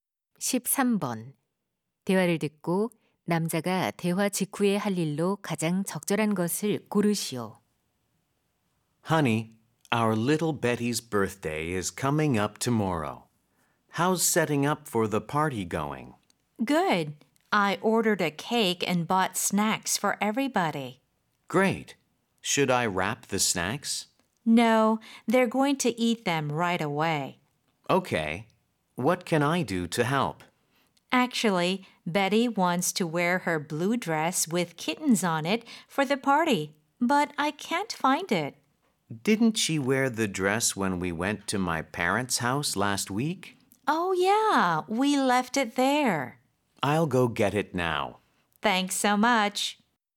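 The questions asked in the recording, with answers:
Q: 대화를 듣고 남자가 대화 직후에 할 일로 가장 적절한 것을 고르시오.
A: 부모님 댁에 가서 딸의 드레스 가져오기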